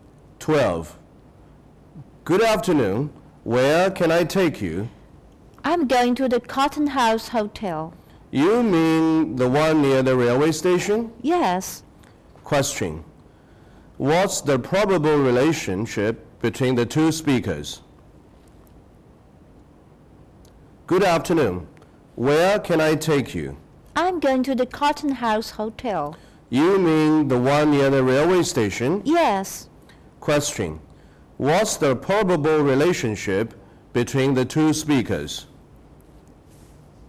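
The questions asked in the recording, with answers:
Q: What's the probable relationship between the two speakers?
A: Taxi driver and passenger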